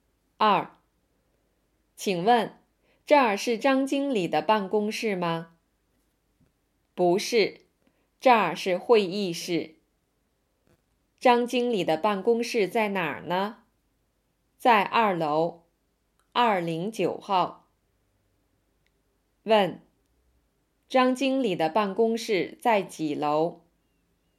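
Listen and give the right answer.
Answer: 2楼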